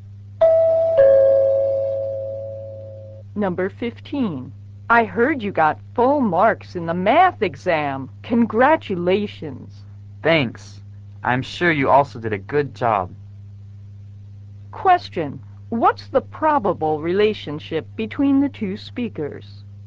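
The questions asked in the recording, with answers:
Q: What's the probable relationship between the two speakers?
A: Classmates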